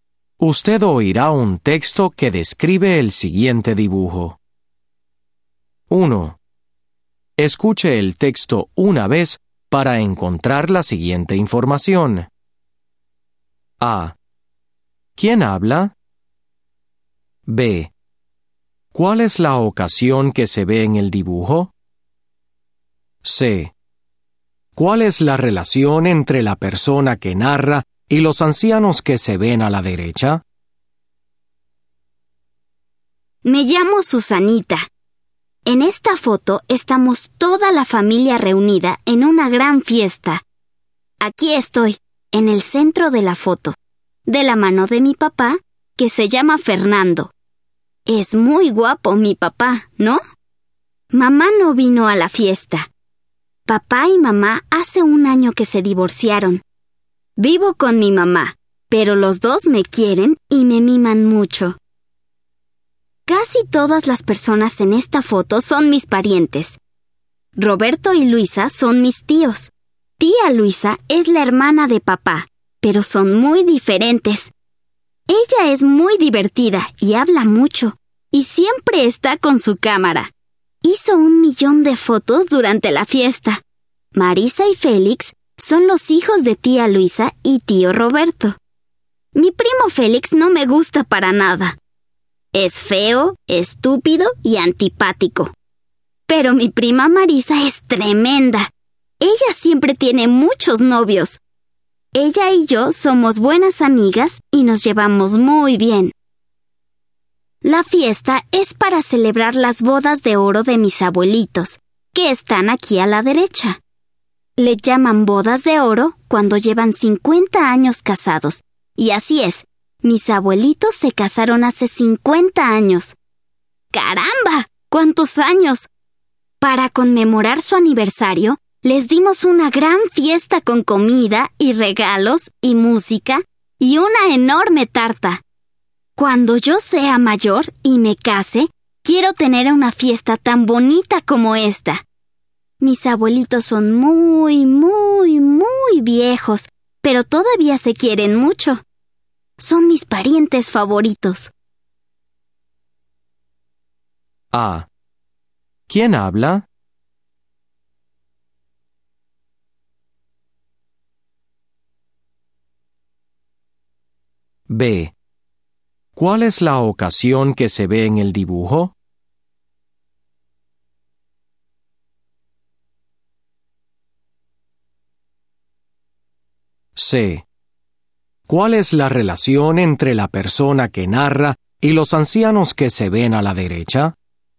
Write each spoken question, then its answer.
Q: ¿Quién habla?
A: Susanita habla, es la niña del centro de la foto.

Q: ¿Cuál es la ocasión que se ve en el dibujo?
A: Es una fiesta para celebrar las bodas de oro, el aniversario de 50 años de Manuel e Isabel.

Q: ¿Cuál es la relación entre la persona que narra y los ancianos que se ven a la derecha?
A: Son sus abuelitos.